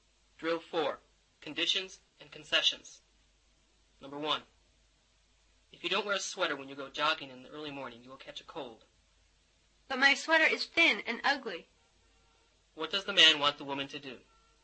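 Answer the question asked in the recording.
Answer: Wear a sweater when she goes jogging in the early morning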